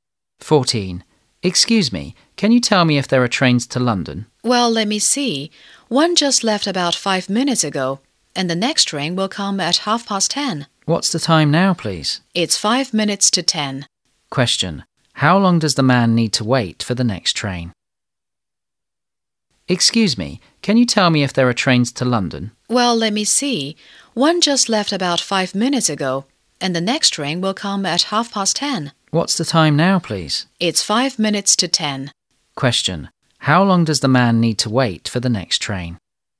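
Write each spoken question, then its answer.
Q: How long does the man need to wait for the next train?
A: 25 minutes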